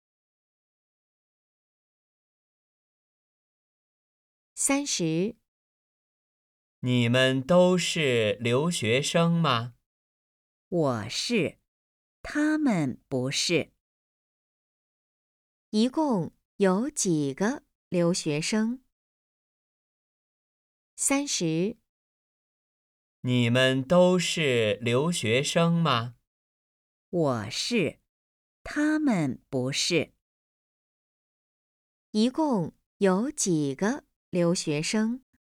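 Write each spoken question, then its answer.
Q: 一共有几个留学生?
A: 一个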